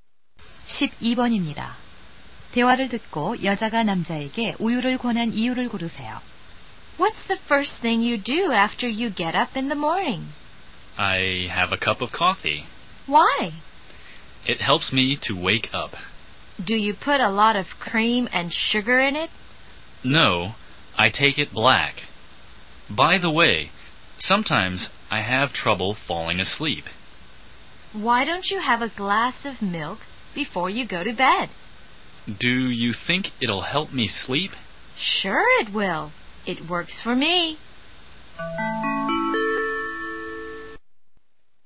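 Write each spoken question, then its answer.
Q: 대화를 듣고 여자가 남자에게 우유를 권한 이유를 고르세요.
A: 잠드는 데 도움이 되어서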